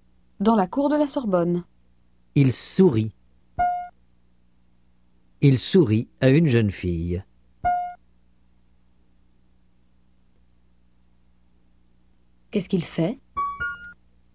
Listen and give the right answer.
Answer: Il sourit à une jeune fille.